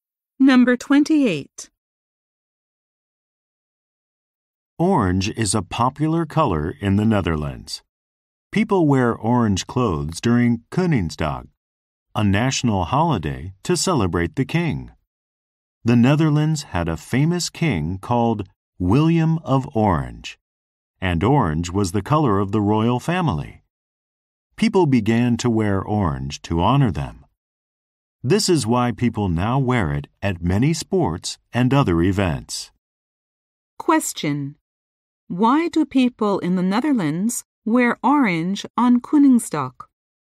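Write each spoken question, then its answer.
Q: Why do people in the Netherlands wear orange on Koningsdag?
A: To honor the royal family, whose color was orange.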